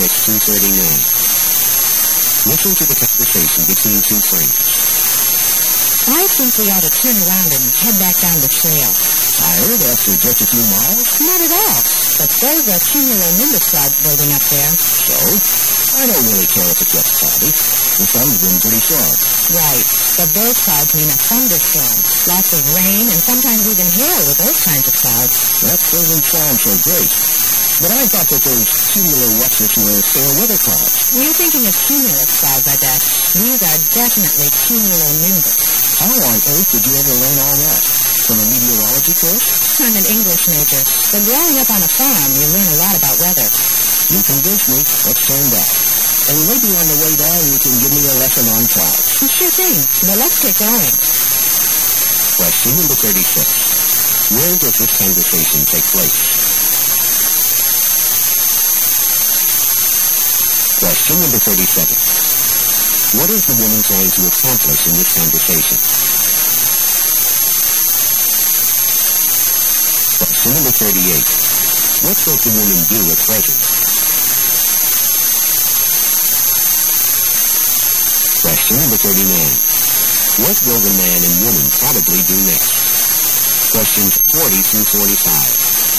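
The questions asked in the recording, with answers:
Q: Where does this conversation take place?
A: On a hiking trail

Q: What will the man and woman probably do next?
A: Head back down the trail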